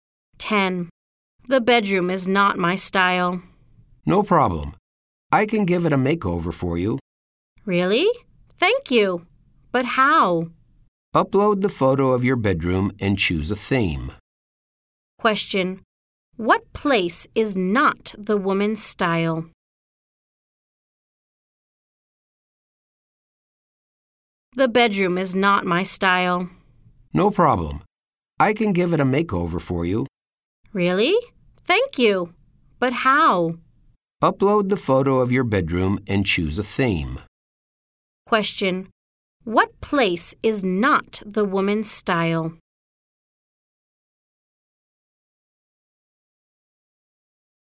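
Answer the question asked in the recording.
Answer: The bedroom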